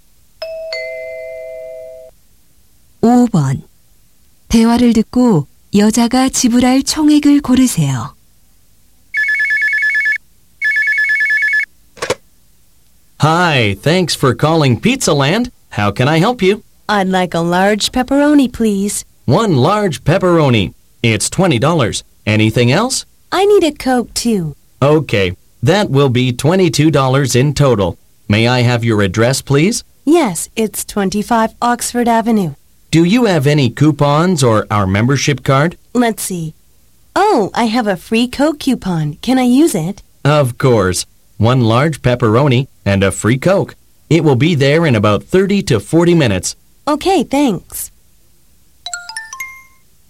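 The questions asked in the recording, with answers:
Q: 대화를 듣고 여자가 지불할 총액을 고르세요.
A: 20달러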